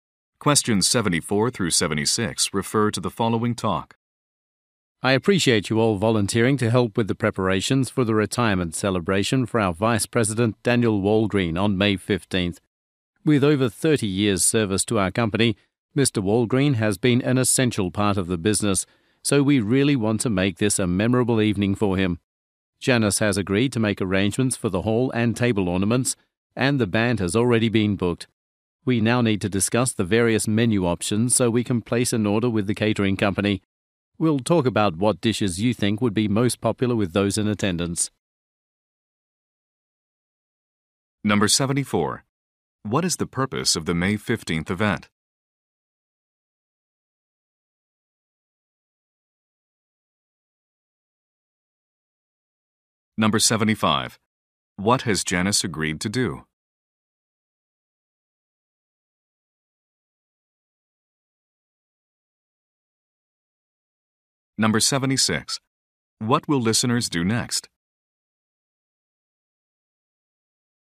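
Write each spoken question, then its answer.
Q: What is the purpose of the May 15th event?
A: To celebrate a vice president's retirement

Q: What has Janice agreed to do?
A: Arrange the hall and table decorations

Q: What will listeners do next?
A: Discuss menu options for the catering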